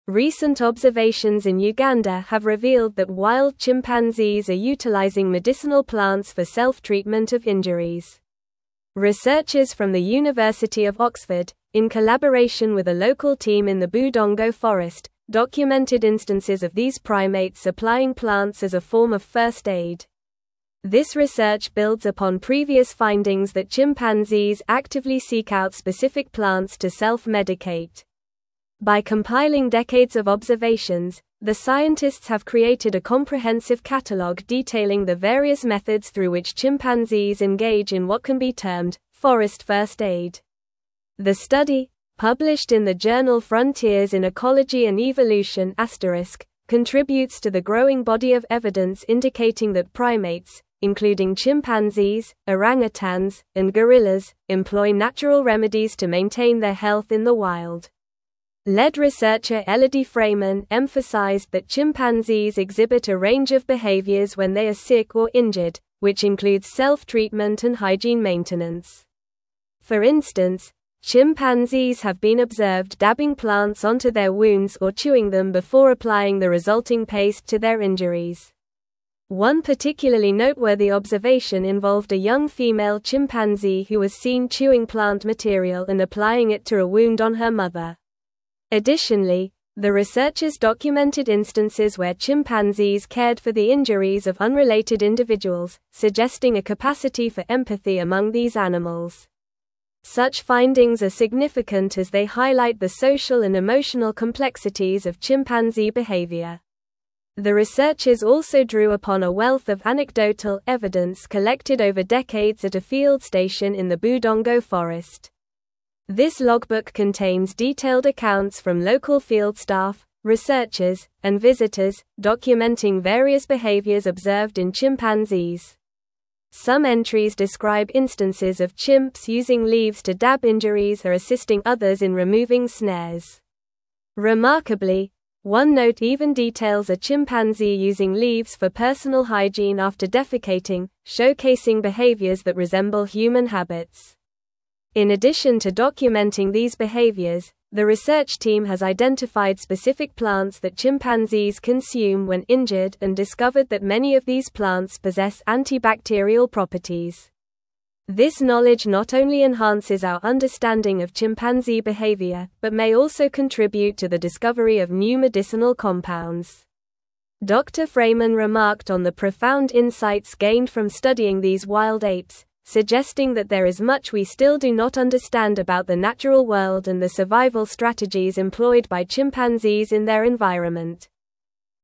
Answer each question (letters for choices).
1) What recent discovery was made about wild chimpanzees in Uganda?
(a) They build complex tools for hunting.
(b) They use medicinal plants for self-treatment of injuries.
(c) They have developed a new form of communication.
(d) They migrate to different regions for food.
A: b

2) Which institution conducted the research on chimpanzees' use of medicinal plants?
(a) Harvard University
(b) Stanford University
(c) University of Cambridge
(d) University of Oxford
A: d

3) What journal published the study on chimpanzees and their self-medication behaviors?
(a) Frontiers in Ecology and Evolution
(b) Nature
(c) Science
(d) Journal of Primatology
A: a

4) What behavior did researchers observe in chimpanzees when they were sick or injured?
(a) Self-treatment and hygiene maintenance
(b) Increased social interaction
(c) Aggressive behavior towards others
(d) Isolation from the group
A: a

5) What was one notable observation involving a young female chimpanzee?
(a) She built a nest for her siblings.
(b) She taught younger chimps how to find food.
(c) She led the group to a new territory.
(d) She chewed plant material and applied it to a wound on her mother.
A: d

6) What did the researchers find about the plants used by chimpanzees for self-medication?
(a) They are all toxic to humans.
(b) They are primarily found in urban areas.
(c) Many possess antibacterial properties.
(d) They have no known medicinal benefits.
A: c

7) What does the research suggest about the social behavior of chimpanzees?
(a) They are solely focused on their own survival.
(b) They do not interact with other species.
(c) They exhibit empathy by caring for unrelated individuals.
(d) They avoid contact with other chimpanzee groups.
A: c

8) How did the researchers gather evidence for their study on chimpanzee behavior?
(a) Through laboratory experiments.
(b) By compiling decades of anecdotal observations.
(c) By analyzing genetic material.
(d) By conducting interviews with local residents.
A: b

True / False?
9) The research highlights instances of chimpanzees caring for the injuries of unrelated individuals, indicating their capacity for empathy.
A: True

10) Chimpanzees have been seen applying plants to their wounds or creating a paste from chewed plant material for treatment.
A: True

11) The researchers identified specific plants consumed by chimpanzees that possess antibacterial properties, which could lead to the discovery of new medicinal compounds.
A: True

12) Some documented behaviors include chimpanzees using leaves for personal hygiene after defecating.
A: True

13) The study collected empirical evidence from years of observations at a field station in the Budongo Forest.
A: False

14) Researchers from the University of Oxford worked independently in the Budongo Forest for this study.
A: False

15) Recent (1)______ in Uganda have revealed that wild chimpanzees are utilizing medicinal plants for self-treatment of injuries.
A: observations

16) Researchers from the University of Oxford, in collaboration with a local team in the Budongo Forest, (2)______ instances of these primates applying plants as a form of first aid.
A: documented

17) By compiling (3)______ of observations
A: decades

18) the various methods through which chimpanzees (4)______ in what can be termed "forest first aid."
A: engage

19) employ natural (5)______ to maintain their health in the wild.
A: remedies

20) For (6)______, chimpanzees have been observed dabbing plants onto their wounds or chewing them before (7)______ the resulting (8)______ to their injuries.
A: instance

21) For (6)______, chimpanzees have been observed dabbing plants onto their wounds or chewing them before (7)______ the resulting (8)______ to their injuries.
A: applying

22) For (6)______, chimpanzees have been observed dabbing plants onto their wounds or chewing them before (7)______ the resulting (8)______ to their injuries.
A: paste

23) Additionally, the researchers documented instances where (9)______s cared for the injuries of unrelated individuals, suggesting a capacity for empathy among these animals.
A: chimpanzee

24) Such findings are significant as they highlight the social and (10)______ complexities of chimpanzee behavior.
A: emotional

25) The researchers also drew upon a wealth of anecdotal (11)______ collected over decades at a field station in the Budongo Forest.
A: evidence

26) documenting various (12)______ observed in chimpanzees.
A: behaviors

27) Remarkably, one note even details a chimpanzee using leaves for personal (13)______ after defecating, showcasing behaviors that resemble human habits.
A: hygiene

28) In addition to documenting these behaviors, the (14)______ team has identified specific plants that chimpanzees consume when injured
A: research

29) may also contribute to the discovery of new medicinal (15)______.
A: compounds

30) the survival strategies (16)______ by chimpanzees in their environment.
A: employed

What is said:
Recent observations in Uganda have revealed that wild chimpanzees are utilizing medicinal plants for self-treatment of injuries. Researchers from the University of Oxford, in collaboration with a local team in the Budongo Forest, documented instances of these primates applying plants as a form of first aid. This research builds upon previous findings that chimpanzees actively seek out specific plants to self-medicate. By compiling decades of observations, the scientists have created a comprehensive catalogue detailing the various methods through which chimpanzees engage in what can be termed "forest first aid."
The study, published in the journal *Frontiers in Ecology and Evolution*, contributes to the growing body of evidence indicating that primates, including chimpanzees, orangutans, and gorillas, employ natural remedies to maintain their health in the wild. Lead researcher Elodie Freymann emphasized that chimpanzees exhibit a range of behaviors when they are sick or injured, which includes self-treatment and hygiene maintenance. For instance, chimpanzees have been observed dabbing plants onto their wounds or chewing them before applying the resulting paste to their injuries.
One particularly noteworthy observation involved a young female chimpanzee who was seen chewing plant material and applying it to a wound on her mother. Additionally, the researchers documented instances where chimpanzees cared for the injuries of unrelated individuals, suggesting a capacity for empathy among these animals. Such findings are significant as they highlight the social and emotional complexities of chimpanzee behavior.
The researchers also drew upon a wealth of anecdotal evidence collected over decades at a field station in the Budongo Forest. This logbook contains detailed accounts from local field staff, researchers, and visitors, documenting various behaviors observed in chimpanzees. Some entries describe instances of chimps using leaves to dab injuries or assisting others in removing snares. Remarkably, one note even details a chimpanzee using leaves for personal hygiene after defecating, showcasing behaviors that resemble human habits.
In addition to documenting these behaviors, the research team has identified specific plants that chimpanzees consume when injured and discovered that many of these plants possess antibacterial properties. This knowledge not only enhances our understanding of chimpanzee behavior but may also contribute to the discovery of new medicinal compounds. Dr. Freymann remarked on the profound insights gained from studying these wild apes, suggesting that there is much we still do not understand about the natural world and the survival strategies employed by chimpanzees in their environment.

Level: Level 4